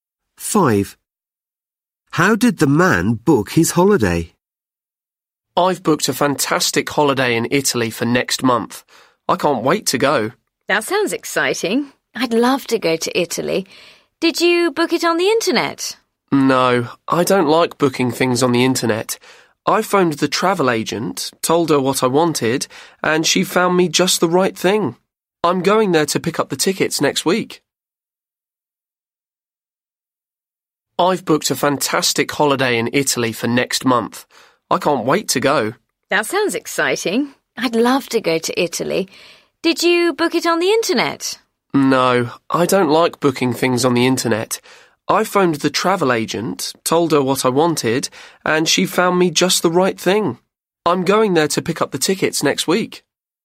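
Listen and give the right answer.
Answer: He phoned the travel agent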